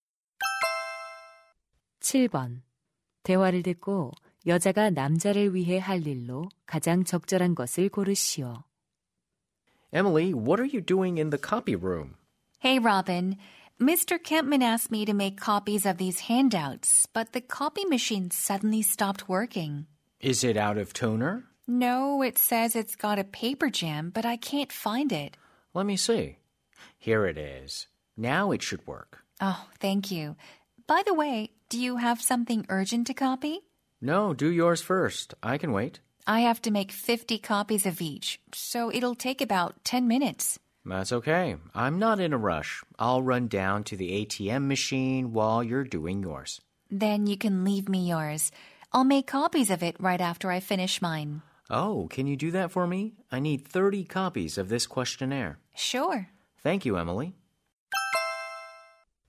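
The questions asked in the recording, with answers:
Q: 대화를 듣고 여자가 남자를 위해 할 일로 가장 적절한 것을 고르시오.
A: 설문지 30부 복사하기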